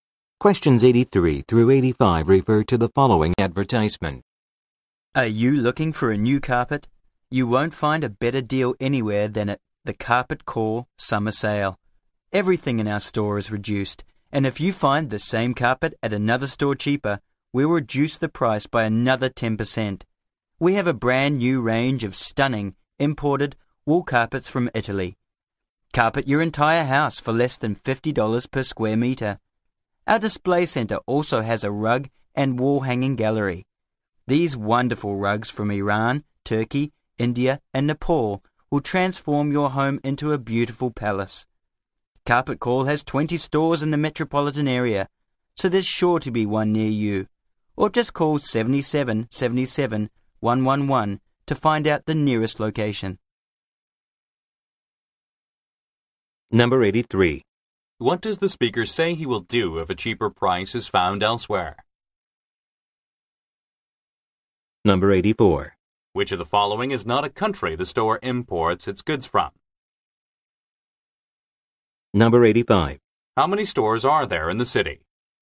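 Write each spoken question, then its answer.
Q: What does the speaker say he will do if a cheaper price is found elsewhere?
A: Reduce the price by another 10%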